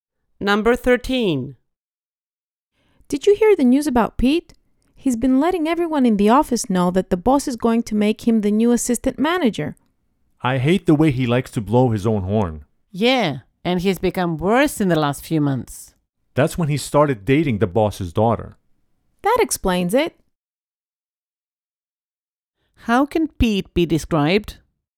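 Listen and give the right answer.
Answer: Boastful: he likes to blow his own horn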